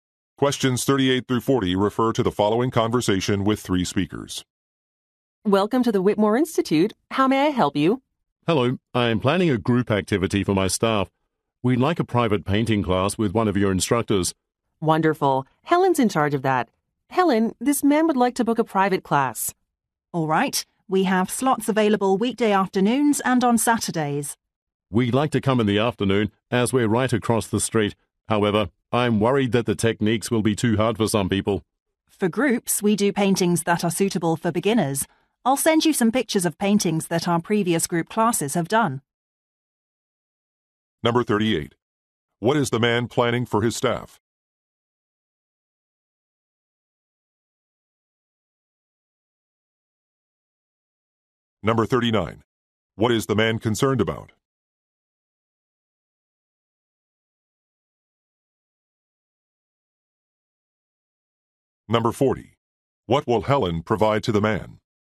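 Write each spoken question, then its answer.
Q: What is the man planning for his staff?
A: A private painting class

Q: What is the man concerned about?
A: The techniques may be too hard for some people

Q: What will Helen provide to the man?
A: Pictures of paintings done by previous group classes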